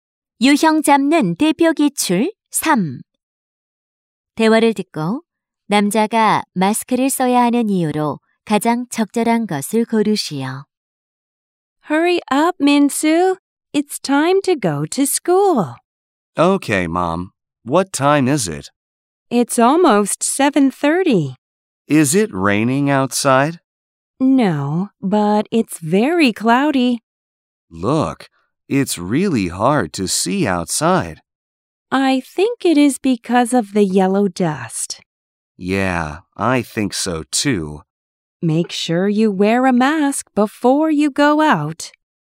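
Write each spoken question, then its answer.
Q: 대화를 듣고 남자가 마스크를 써야 하는 이유로 가장 적절한 것을 고르시오.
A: 황사 때문에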